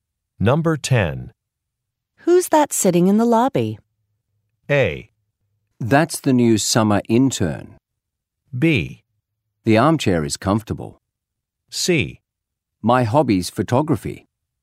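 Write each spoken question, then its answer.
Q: Who's that sitting in the lobby?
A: A: That's the new summer intern.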